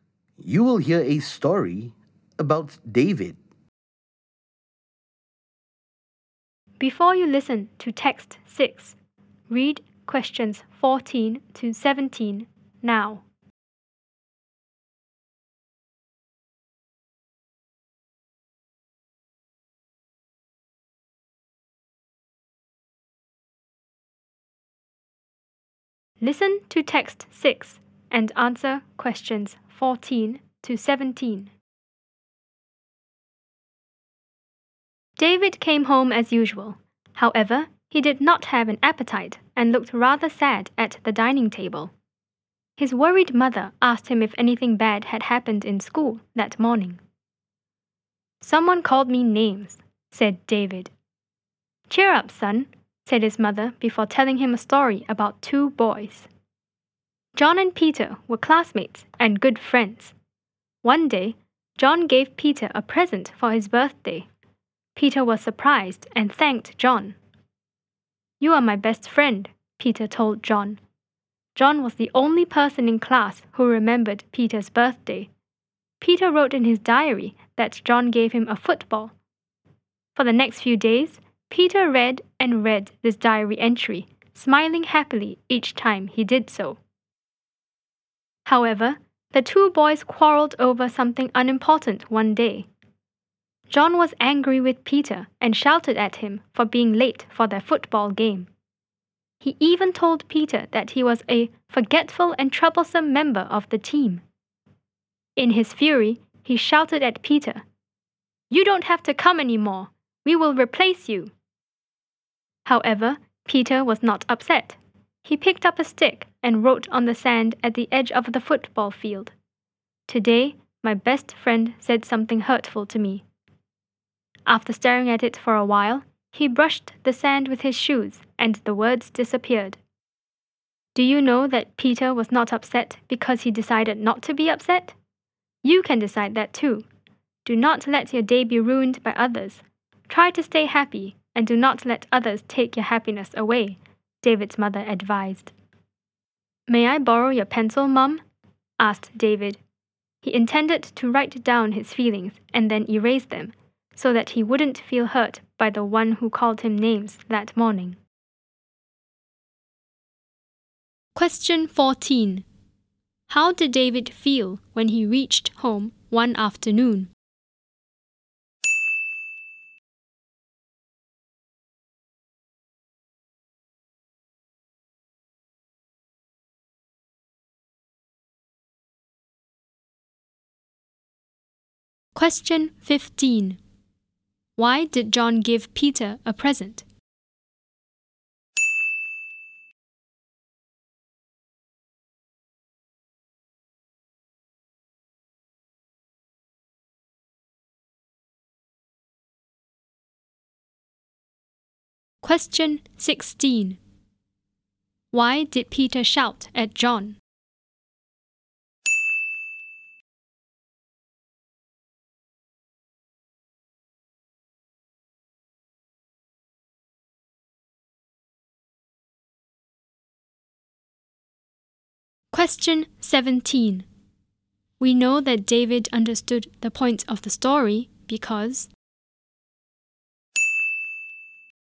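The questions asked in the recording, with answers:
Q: How did David feel when he reached home one afternoon?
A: Sad, because someone had called him names

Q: Why did John give Peter a present?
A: It was Peter's birthday

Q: We know that David understood the point of the story because...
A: he wanted to borrow a pencil to write down his feelings and then erase them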